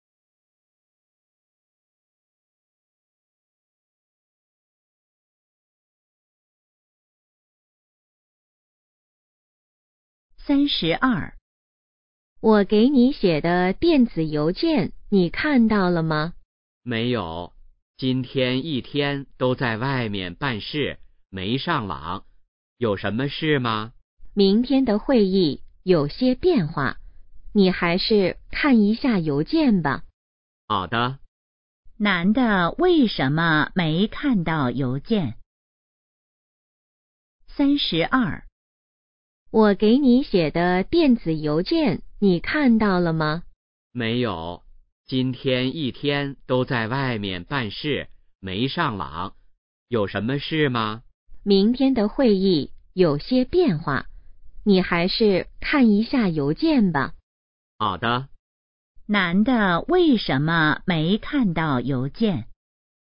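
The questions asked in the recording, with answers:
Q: 男的为什么没看到邮件?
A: 一天在外面办事,没上网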